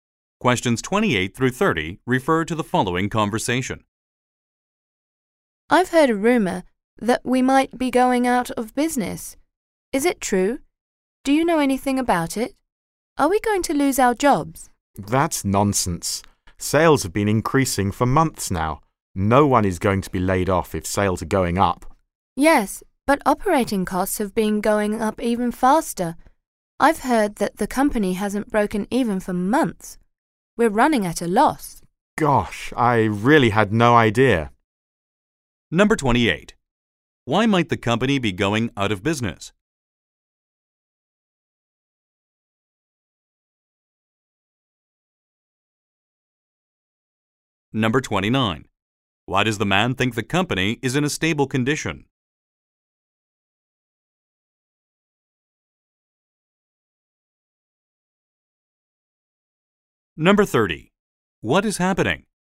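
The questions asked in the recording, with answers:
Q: Why might the company be going out of business?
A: Operating costs are rising faster than sales

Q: Why does the man think the company is in a stable condition?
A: Sales have been increasing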